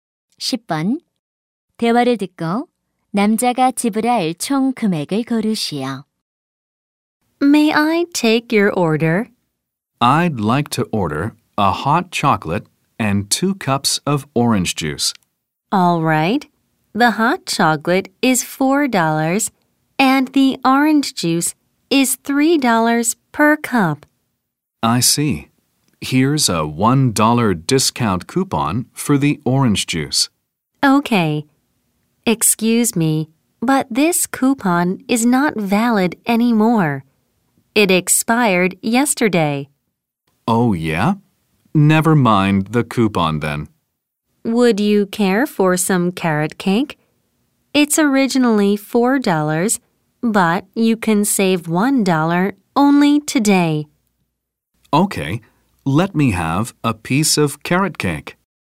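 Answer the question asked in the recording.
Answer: $13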